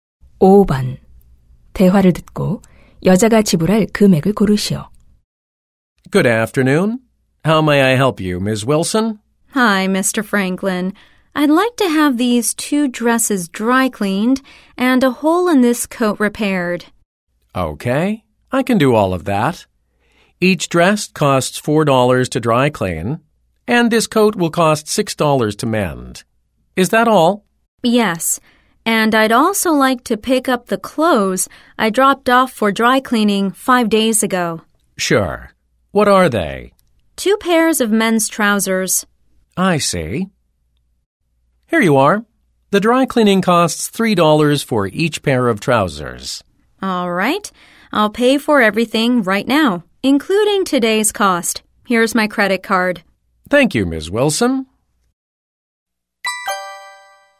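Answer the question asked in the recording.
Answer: $20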